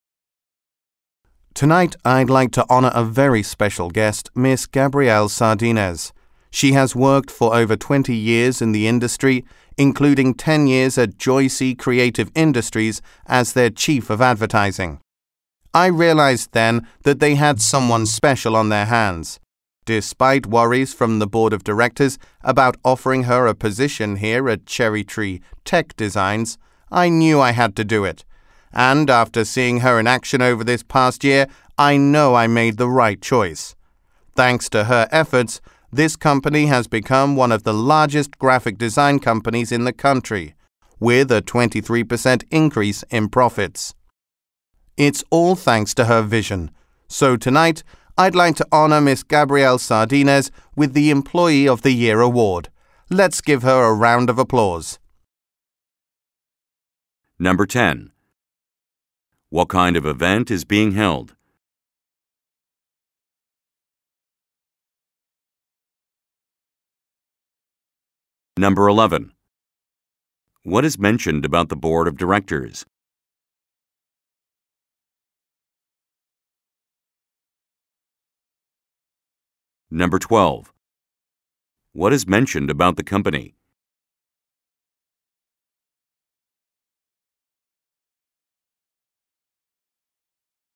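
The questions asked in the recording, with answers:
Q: What kind of event is being held?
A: An awards ceremony (Employee of the Year Award)

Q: What is mentioned about the Board of Directors?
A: They had worries about offering her a position

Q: What is mentioned about the company?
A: It became one of the largest graphic design companies in the country, with a 23% increase in profits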